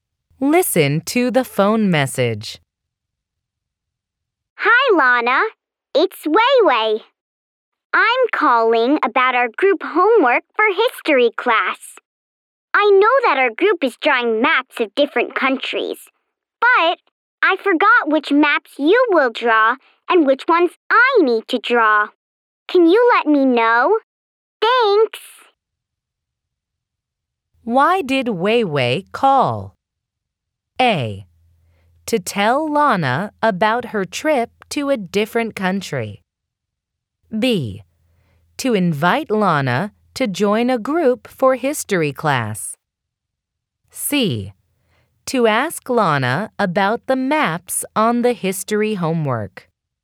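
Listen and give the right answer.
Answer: C: To ask Lana about the maps on the history homework.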